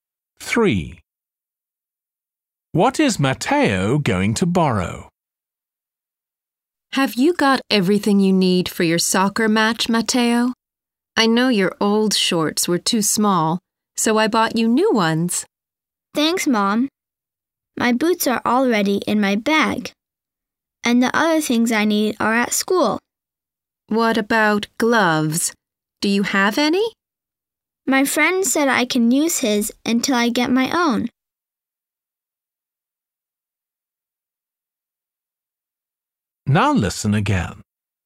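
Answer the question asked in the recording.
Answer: gloves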